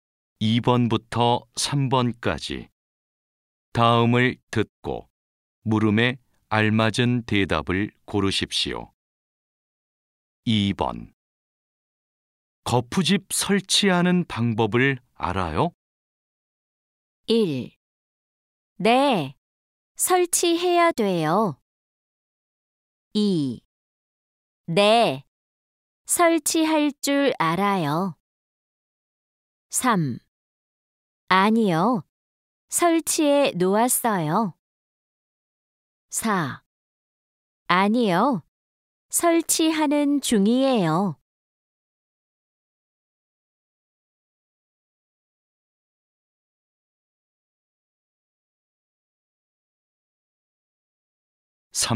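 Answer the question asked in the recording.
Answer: 2: 네, 설치할 줄 알아요.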